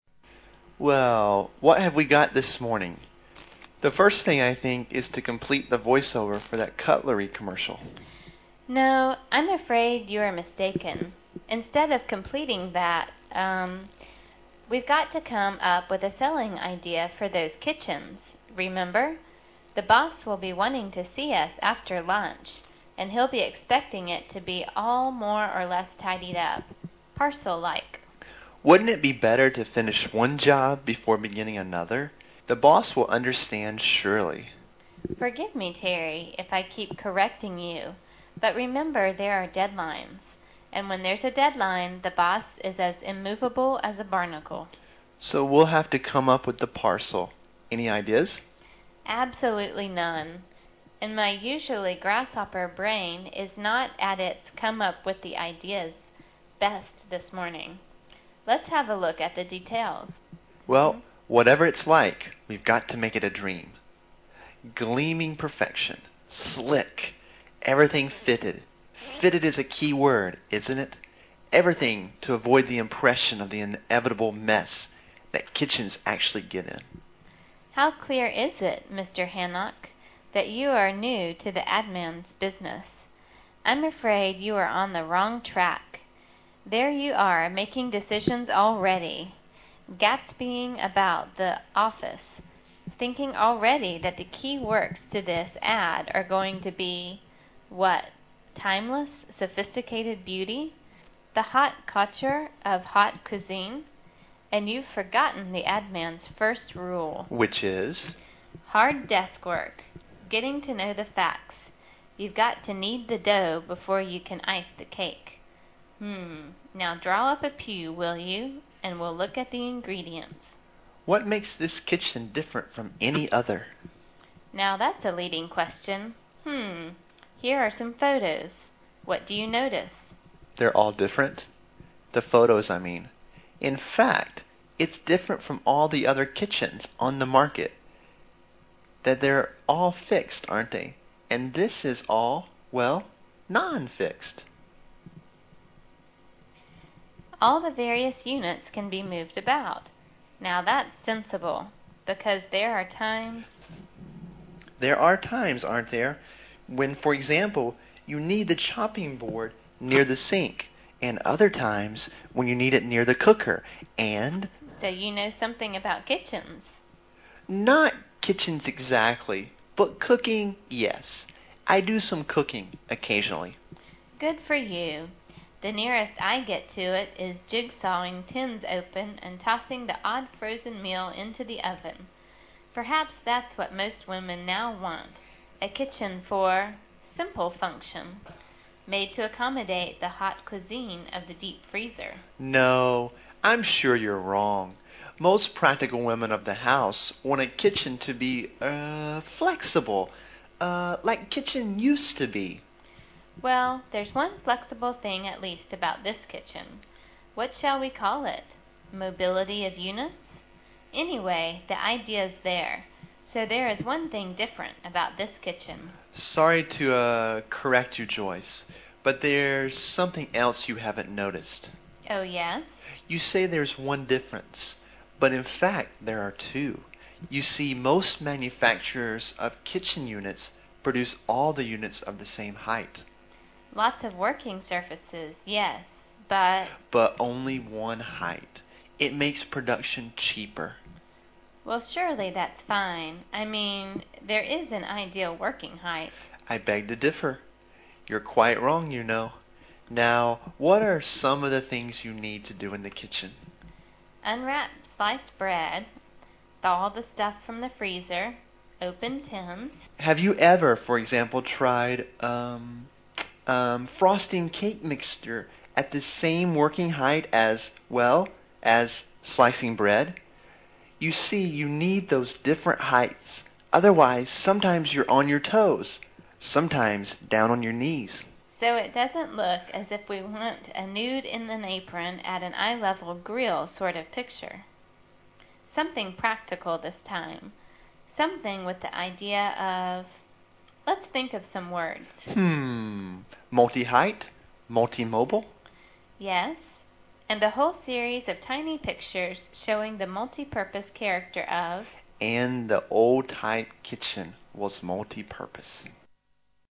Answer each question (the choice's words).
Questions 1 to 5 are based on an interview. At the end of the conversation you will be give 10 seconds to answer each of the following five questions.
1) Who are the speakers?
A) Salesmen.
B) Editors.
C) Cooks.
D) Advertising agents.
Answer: Advertising agents.

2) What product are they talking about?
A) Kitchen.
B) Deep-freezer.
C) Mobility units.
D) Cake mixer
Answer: Kitchen.

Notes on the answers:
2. Terry: Well what have we got this morning? The first

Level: 专业八级